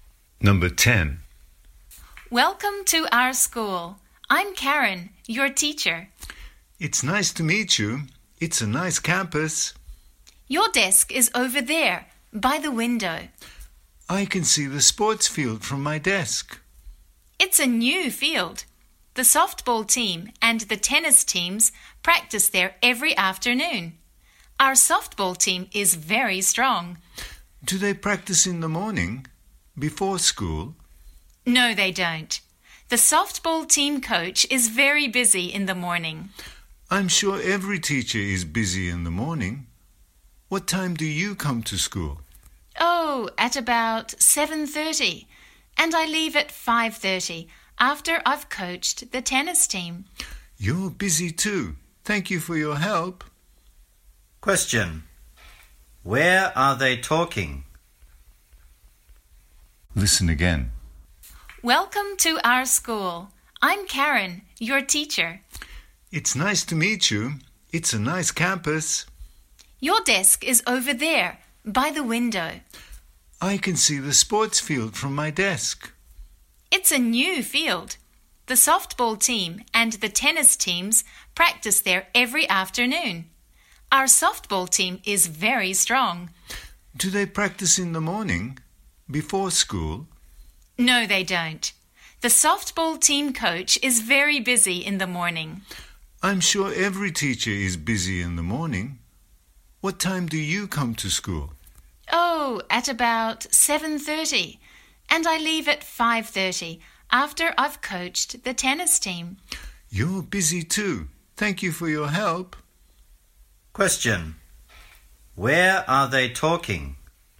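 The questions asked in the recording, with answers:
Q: Where are they talking?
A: At school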